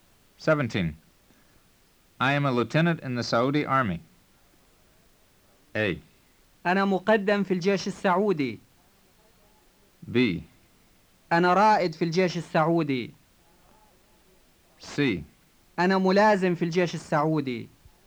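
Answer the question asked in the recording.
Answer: C: أنا ملازم في الجيش السعودي.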